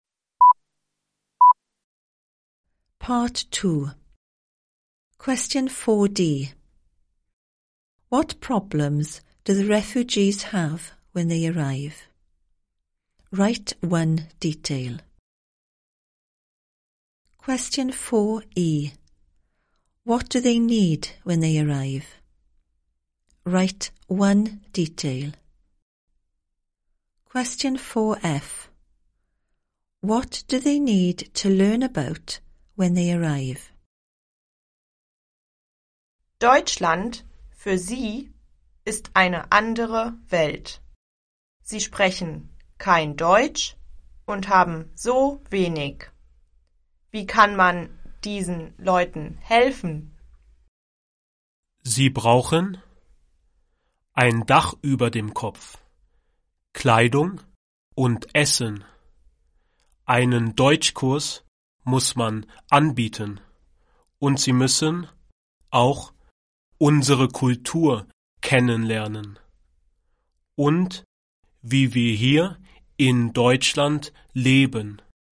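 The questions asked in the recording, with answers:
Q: What problems do the refugees have when they arrive?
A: They speak no German and have so little

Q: What do they need when they arrive?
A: A roof over their heads, clothing, food, a German course

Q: What do they need to learn about when they arrive?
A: German culture and how people live in Germany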